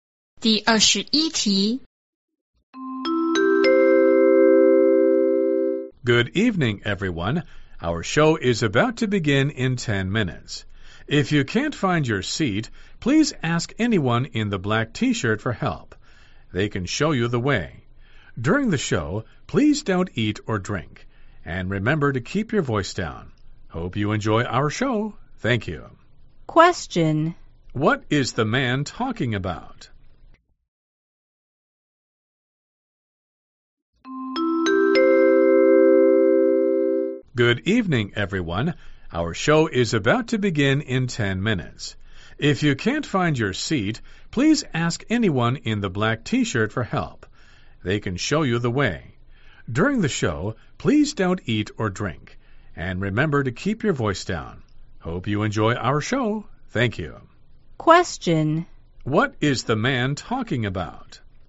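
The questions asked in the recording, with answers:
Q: What is the man talking about?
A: The rules for the audience before the show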